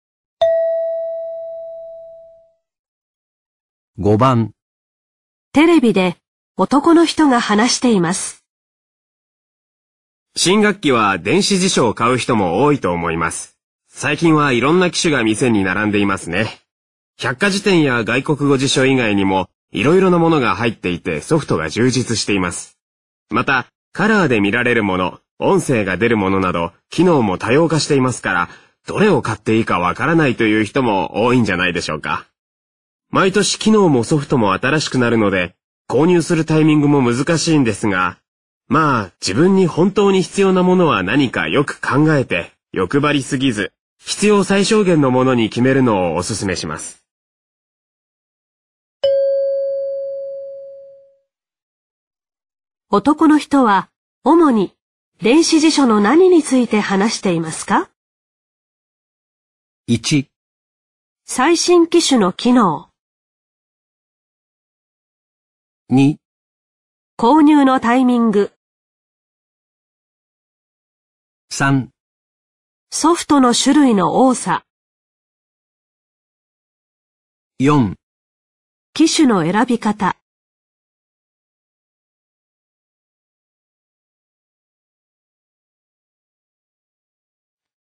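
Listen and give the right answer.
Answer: 4: 機種の選び方。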